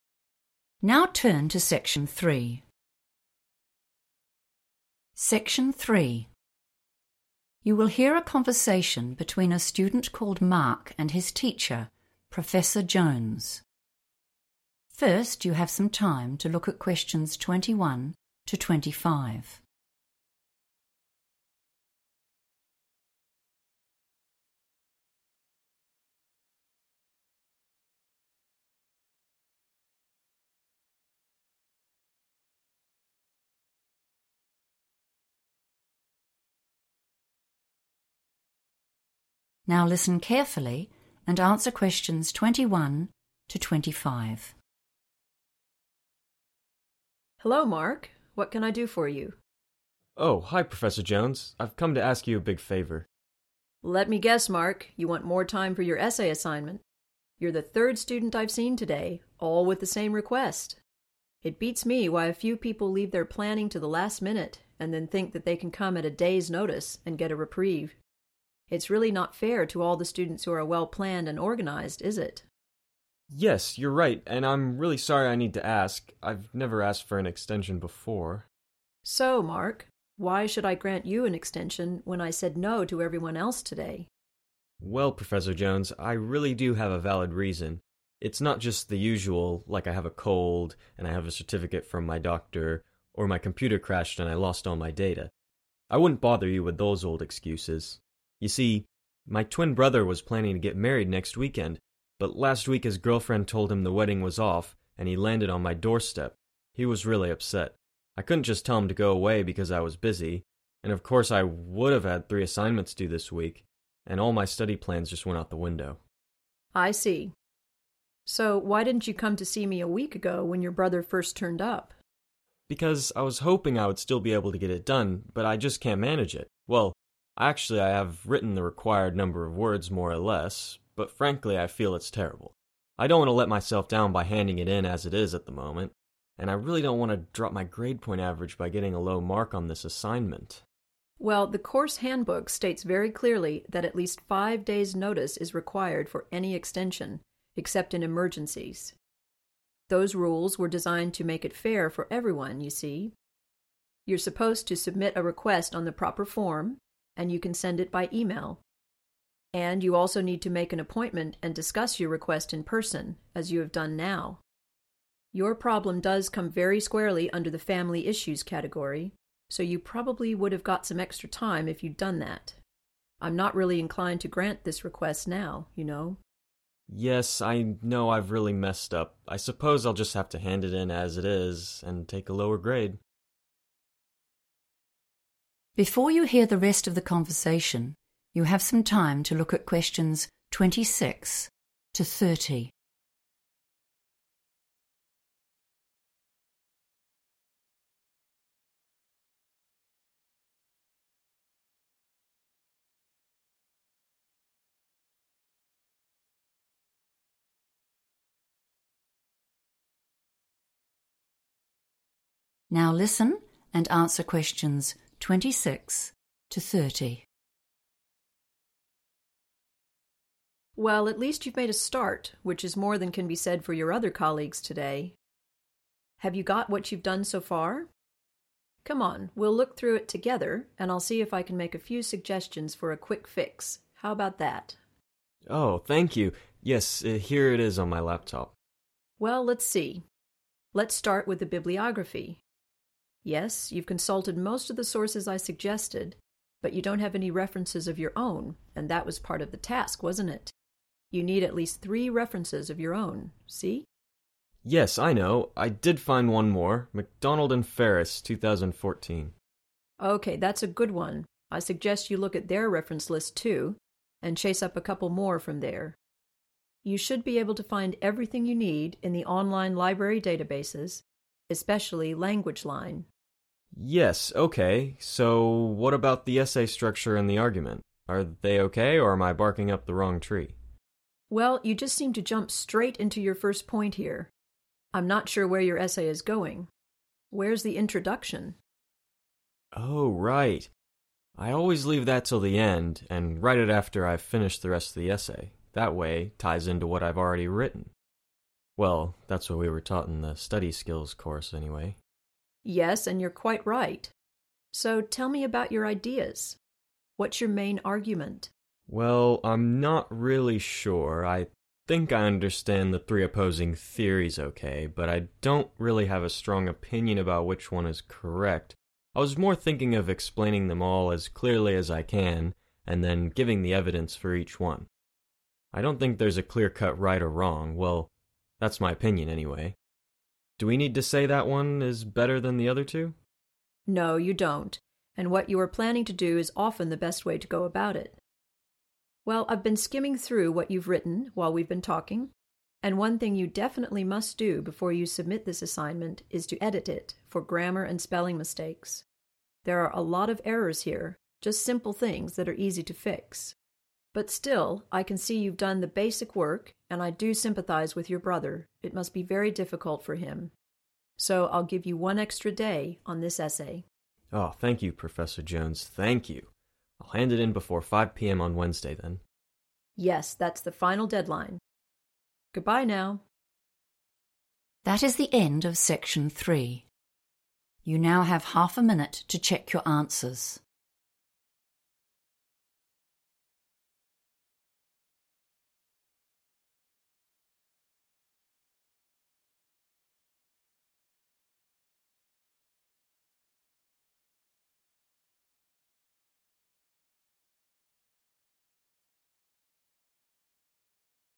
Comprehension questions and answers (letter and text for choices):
Choose TWO letters, A–E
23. Mark needs an extension because:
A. he was sick and went to the doctor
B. he had a problem with his computer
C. his brother had a personal problem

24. Mark didn't come to see Professor Jones a week ago because:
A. he thought his writing was very bad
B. he planned to finish the essay on time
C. he wanted to keep his grade point average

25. Which rule below is NOT correct? You should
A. ask at least 3 days before the essay is due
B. fill out a form and then email it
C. talk to your teacher in person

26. Mark needs to add _____ to his bibliography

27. His essay has no _____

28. Mark plans to explain the theories and show _____ for each of them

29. He should _____ the essay before he hands it in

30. He can have one _____ for his assignment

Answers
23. C. his brother had a personal problem
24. B. he planned to finish the essay on time
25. A. ask at least 3 days before the essay is due
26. three references / 3 references
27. introduction
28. evidence
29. edit
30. extra day

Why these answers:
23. The correct answer is correct because Mark explains that his brother's wedding was cancelled at the last minute. This made his brother very sad ('upset'), and Mark had to support him instead of focusing on his schoolwork. Mark also specifically mentions that his reason is not a sickness ('a cold') or a computer problem ('computer crashed'), which makes the other options wrong.
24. The correct answer is B because Mark tells the professor he didn't visit her a week ago because he believed he could still finish his essay. He uses the phrase "get it done," which means to complete the work. Even though his brother had problems, Mark was "hoping" or planning to finish on schedule. He only came for help once he realized the task was too big to "manage" on his own.
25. The correct answer is A because the question asks which rule is NOT correct. In the transcript, Professor Jones explains the rules for getting an extension (extra time) on an assignment. He says that the handbook requires at least 5 days' notice. This makes choice A (which says 3 days) incorrect. Choice B is correct because the teacher says to use a 'proper form' and send it by 'email.' Choice C is correct because the teacher says you must 'discuss your request in person.'
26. The correct answer is "three / 3 references" because Professor Jones reviews Mark's work and notices that while he used the sources she provided, he did not include any of his own. She reminds him that the assignment instructions require him to include at least three sources he found independently. Keywords like "bibliography" and "references of your own" in the transcript match the context of the notes.
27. The correct answer is 'introduction' because while Professor Jones is reviewing Mark's work, she notices that he began his first argument immediately without an opening paragraph. She asks him specifically where this missing part is. Mark then confirms that he has not written it yet because he prefers to write it after finishing the rest of the essay.
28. The correct answer is "evidence" because, during the conversation, Mark explains his plan for the essay structure. He mentions that he understands the three different theories and intends to explain them clearly. He specifically states that his goal is to provide the support or facts (synonyms for evidence) for every one of those theories rather than choosing a favorite. In the sentence "giving the evidence for each one," the word "giving" acts as a synonym for "show" used in the task.
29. The correct answer is correct because Professor Jones looked at Mark's essay and saw many small errors in grammar and spelling. She told him that before he turns in (submits) his work, he needs to fix those mistakes. The word 'edit' is the specific verb used in the transcript to describe this action.
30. The correct answer is found near the end of the conversation. Although Professor Jones was strict at first, she sees that Mark has done some work and feels sorry for his brother's situation. Because of this, she allows him one more day to finish and hand in his assignment.

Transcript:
Jones: Hello Mark. What can I do for you?
Mark: Oh, hi Professor Jones. I've come to ask you a big favour.
Jones: Let me guess, Mark, you want more time for your essay assignment. You're the third student I've seen today, all with the same request! It beats me why a few people leave their planning to the last minute and then think they can come at a day's notice and get a reprieve. It's really not fair to all the students who are well planned and organised is it?
Mark: Yes, you're right, and I'm really sorry I need to ask. I've never asked for an extension before.
Jones: So, Mark, why should I grant you an extension when I said no to everyone else today?
Mark: Well, Professor Jones, I really do have a valid reason. It's not just the usual, like I have a cold, and I have a certificate from my doctor, or my computer crashed and I lost all my data. I wouldn't bother you with those old excuses. You see, my twin brother was planning to get married next weekend, but last week his girlfriend told him the wedding was off and he landed on my doorstep. He was really upset. I couldn't just tell him to go away because I was busy. And of course I would have had three assignments due this week, and all my study plans just went out the window.
Jones: I see. So, why didn't you come to see me a week ago when your brother first turned up?
Mark: Because I was hoping I would still be able to get it done, but I just can't manage it. Well, actually I have written the required number of words, more or less, but frankly, I feel it's terrible. I don't want to let myself down by handing it in as it is at the moment, and I really don't want to drop my grade point average by getting a low mark on this assignment.
Jones: Well, the course handbook states very clearly that at least 5 days' notice is required for any extension, except in emergencies. Those rules were designed to make it fair for everyone you see. You're supposed to submit a request on the proper form.... and you can send it by email. And you also need to make an appointment and discuss your request in person, as you have done now. Your problem does come very squarely under the 'family issues' category, so you probably would have got some extra time if you'd done that. I'm not really inclined to grant this request now, you know.
Mark: Yes, I know I've really messed up. I suppose I'll just have to hand it in as it is, and take a lower grade.
Before you hear the rest of the conversation, you have some time to look at questions 26 to 30.
Now listen and answer questions 26 to 30.
Jones: Well, at least you've made a start, which is more than can be said for your other colleagues today. Have you got what you've done so far? Come on, we'll look through it together and I'll see if I can make a few suggestions for a quick fix, how about that?
Mark: Oh, thank you, yes here it is on my laptop.
Jones: Well, let's see. Let's start with the bibliography ... Yes, you've consulted most of the sources I suggested, but you don't have any references of your own, and that was part of the task, wasn't it? You need at least three references of your own, see?
Mark: Yes, I know. I did find one more, McDonald and Ferris 2014.
Jones: OK, that's a good one, I suggest you look at their reference list, too, and chase up a couple more from there. You should be able to find everything you need in the online library databases, especially Languageline.
So, what about the essay structure, and the argument? Are they OK, or am I barking up the wrong tree?
Jones: Well, you just seem to jump straight in to your first point here. I'm not sure where your essay is going. Where's the introduction?
Mark: Oh right ... I always leave the introduction till the end and write it after I've finished the rest of the essay. That way, it ties in to what I've already written ... Well, that's what we were taught in the study skills course, anyway.
Jones: Yes, and you're quite right. So, tell me about your ideas. What's your main argument?
Mark: Well, I'm not really sure. I think I understand the 3 opposing theories OK, but I don't really have a strong opinion about which one is correct. I was more thinking of explaining them all as clearly as I can, and then giving the evidence for each one. I don't think there is a clear-cut right or wrong, well, that's my opinion anyway. Do we need to say that one is better than the other two?
Jones: No, you don't, and what you are planning to do is often the best way to go about it. Well, I've been skimming through what you've written while we've been talking, and one thing you definitely must do before you submit this assignment is to edit it for grammar and spelling mistakes. There are a lot of errors here, just simple things that are easy to fix. But still, I can see you've done the basic work, and I do sympathise with your brother, it must be very difficult for him. So, I'll give you one extra day on this essay.
Mark: Oh, thank you Professor Jones, thank you! I'll hand it in before 5pm on Wednesday, then.
Jones: Yes, that's the final deadline. Goodbye now!
That is the end of section 3. You now have half a minute to check your answers.